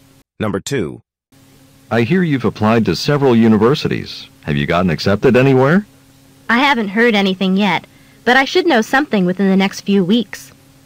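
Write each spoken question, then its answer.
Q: What does the woman mean?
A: She hasn't heard from any university yet but expects to in a few weeks.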